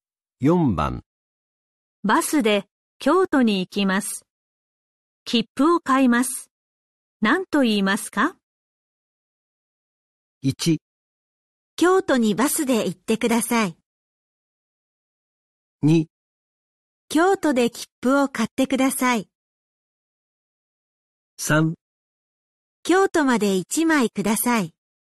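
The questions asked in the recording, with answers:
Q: バスで京都に行きます。切符を買います。何と言いますか?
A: 3: 京都まで1枚ください。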